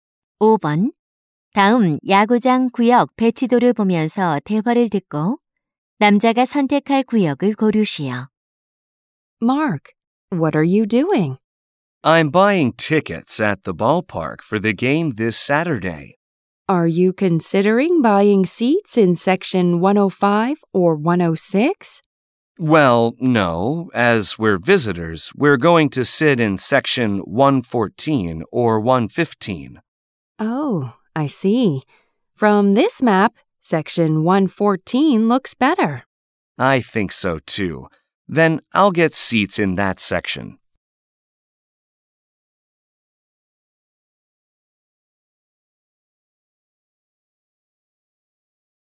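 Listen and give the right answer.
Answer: 114구역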